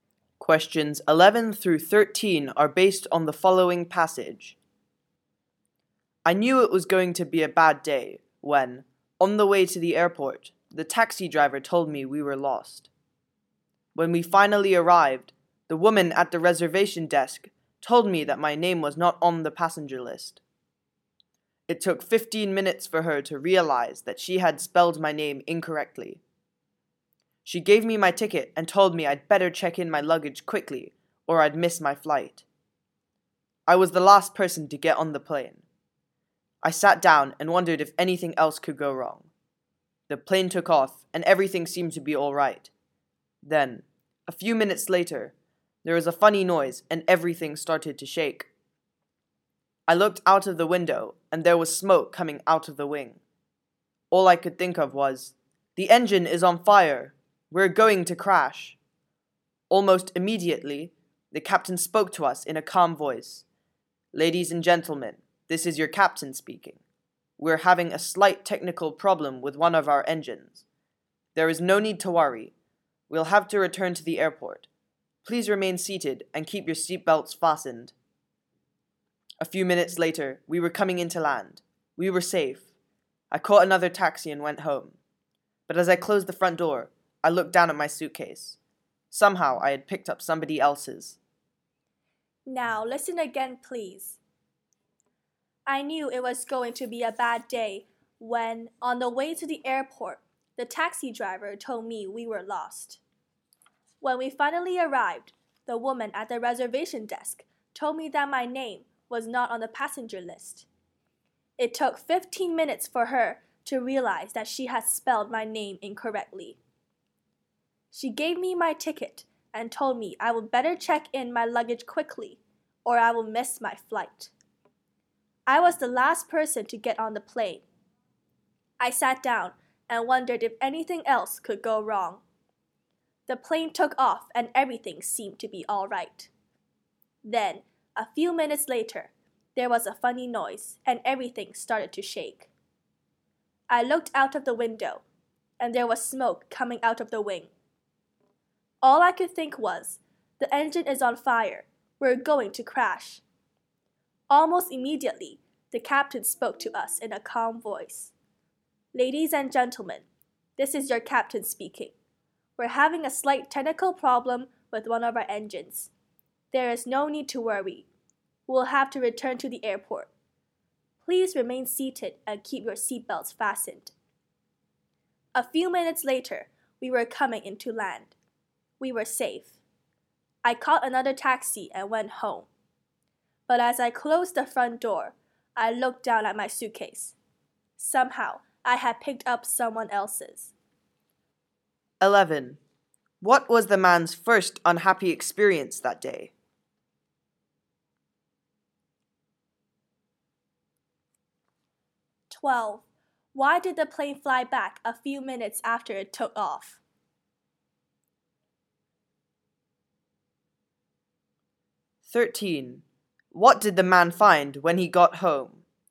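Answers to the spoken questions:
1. The taxi driver got lost on the way to the airport
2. One of its engines had a technical problem
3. He had picked up someone else's suitcase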